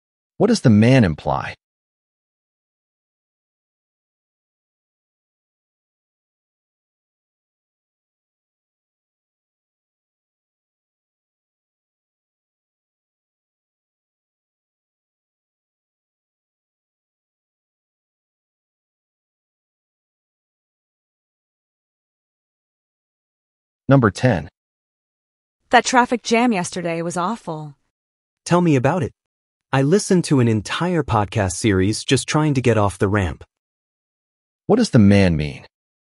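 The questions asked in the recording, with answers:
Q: What does the man mean?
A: The traffic jam was very long; he was stuck for hours.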